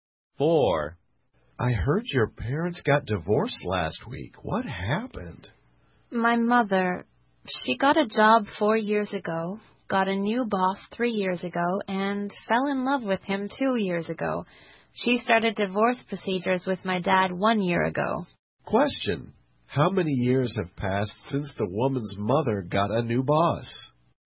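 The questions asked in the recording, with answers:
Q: How many years have passed since the woman's mother got a new boss?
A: 3 years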